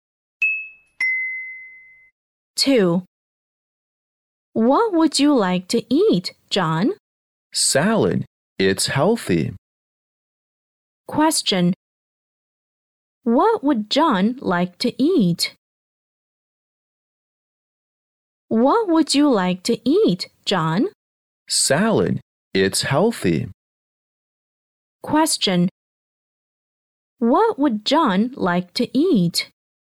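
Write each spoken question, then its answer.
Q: What would John like to eat?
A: Salad.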